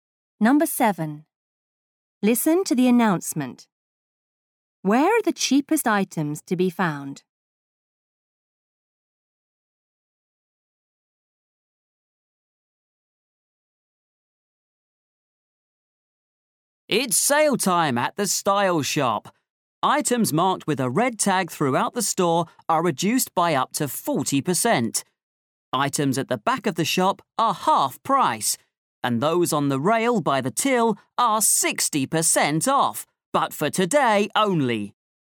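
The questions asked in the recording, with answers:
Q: Where are the cheapest items to be found?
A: On the rail by the till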